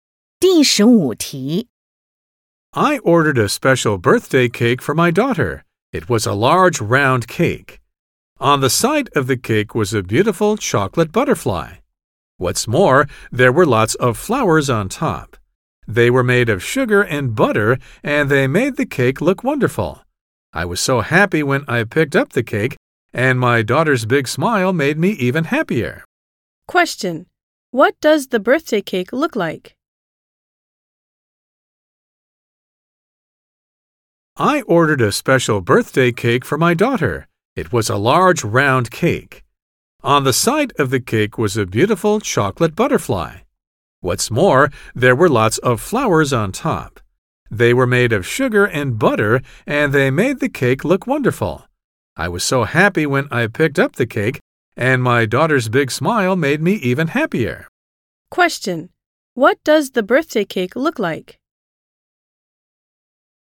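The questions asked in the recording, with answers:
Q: what does the birthday cake look like?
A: Large and round, a chocolate butterfly on the side, sugar-and-butter flowers on top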